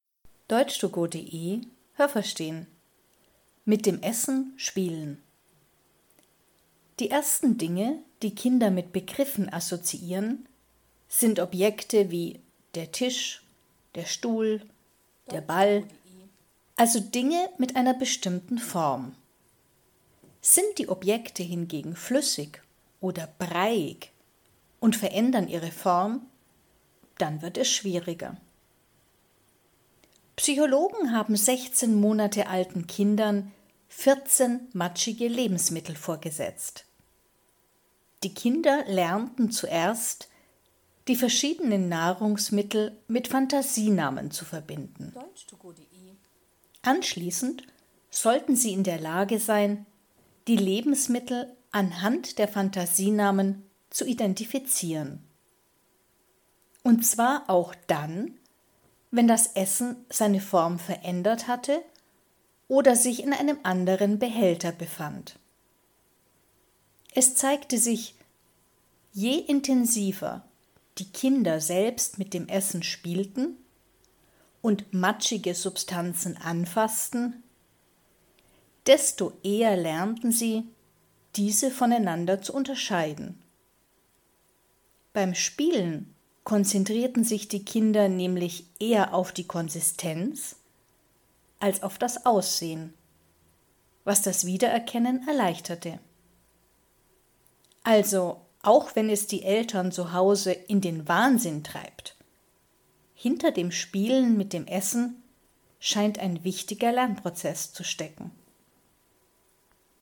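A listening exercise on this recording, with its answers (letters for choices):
Was haben Sie gehört? Es gibt nur eine korrekte Antwort.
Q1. Kinder lernen zuerst Wörter von Dingen, ....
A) deren Form sich nicht verändert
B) deren Form sich verändert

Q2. Psychologen gaben ______ alten Kindern matschige Lebensmittel.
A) 14 Monate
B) 16 Monate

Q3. Die Nahrungsmittel wurden mit _____ bezeichnet.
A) den richtigen Namen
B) Fantasienamen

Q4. Die Psychologen ...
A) änderten dann die Form des Essens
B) setzten die Kinder dann in einen Behälter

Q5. Wenn die Kinder mit dem Essen spielten, konnten sie die matschigen Substanzen ...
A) besser voneinander unterscheiden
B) nicht so gut voneinander unterscheiden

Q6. Beim Spielen konzentrierten sich die Kinder ...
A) vor allem auf das Aussehen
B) vor allem auf die Konsistenz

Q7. Wenn die Kinder mit dem Essen spielen, dann ...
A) lernen Kinder viel dabei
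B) lernen Eltern viel dabei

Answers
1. A
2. B
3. B
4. A
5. A
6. B
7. A

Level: B2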